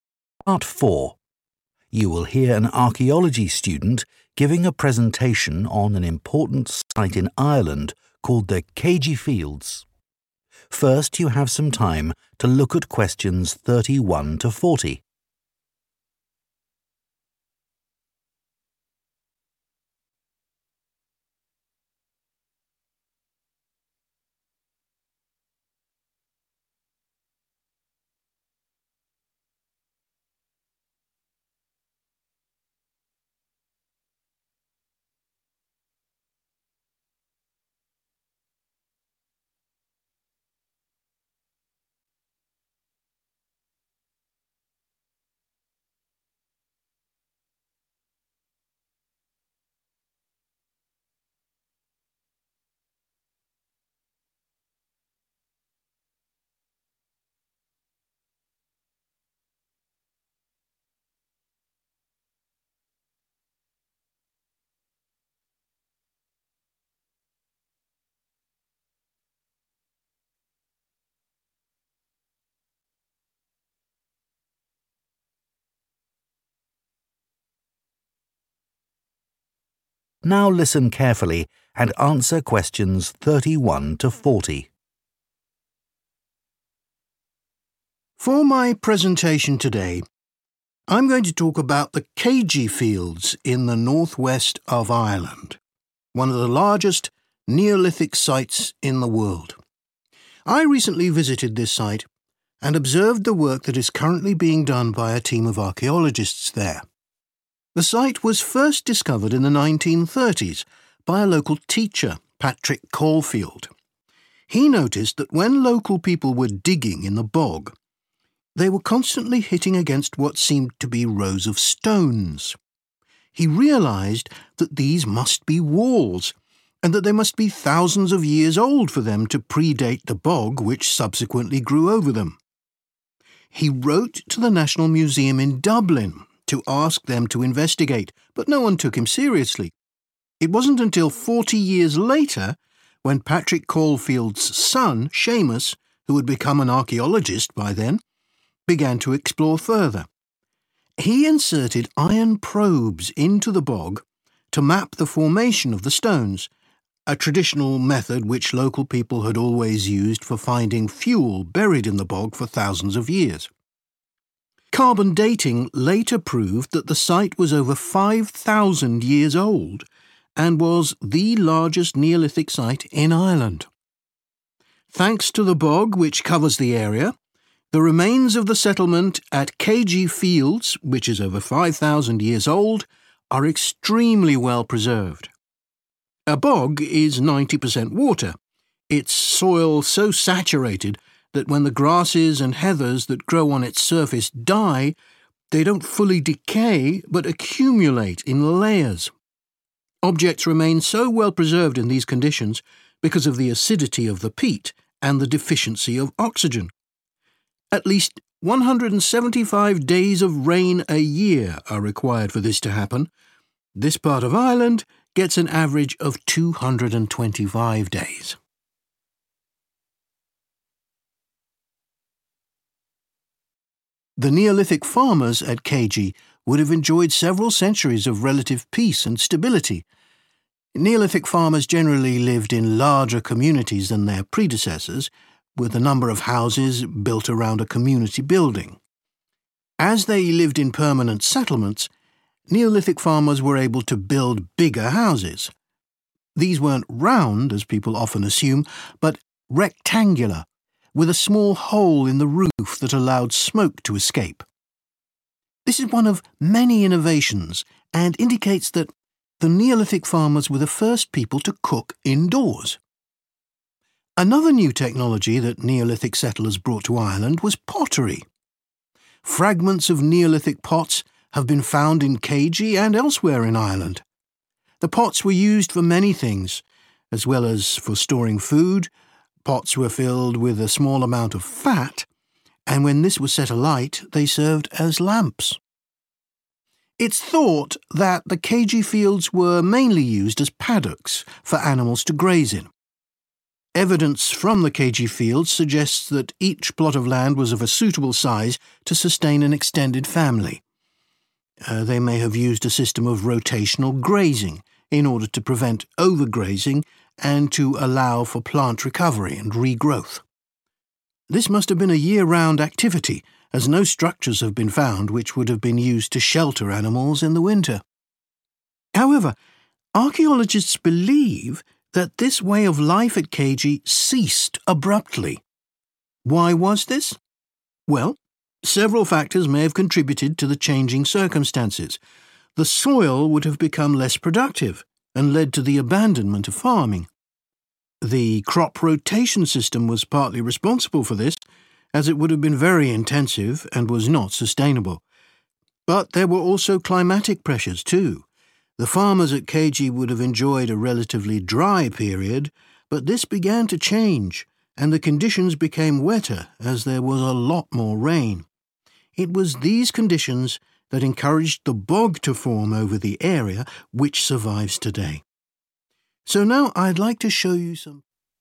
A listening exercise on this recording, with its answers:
Complete the notes below.Write ONE WORD ONLY for each answer.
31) In the 1930s, a local teacher realised that stones beneath the bog surfacewere once 31 .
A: walls

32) His 32 became an archaeologist and undertook aninvestigation of the site:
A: son

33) a traditional method used by local people to dig for 33 was used to identify where stones were located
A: fuel

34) Items are well preserved in the bog because of a lack of 34 .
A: oxygen

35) Houses were 35 in shape and had a hole in the roof.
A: rectangular

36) pots used for storage and to make 36 .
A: lamps

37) Each fi eld at Céide was large enough to support a big 37 .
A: family

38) The fi elds were probably used to restrict the grazing of animals – noevidence of structures to house them during 38 .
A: winter

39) a decline in 39 quality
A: soil

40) an increase in 40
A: rain